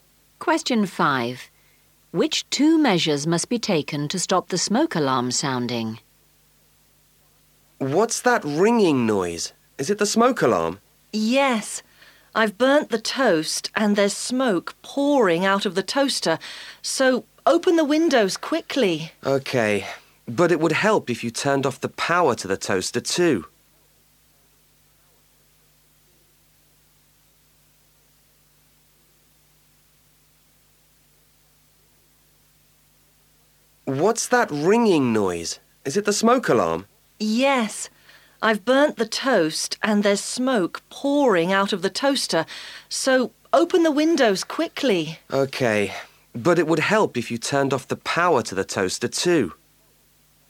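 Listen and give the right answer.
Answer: Open the windows and turn off the power to the toaster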